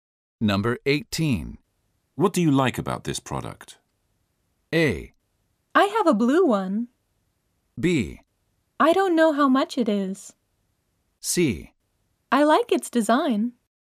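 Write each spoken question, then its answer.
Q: What do you like about this product?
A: C: I like its design.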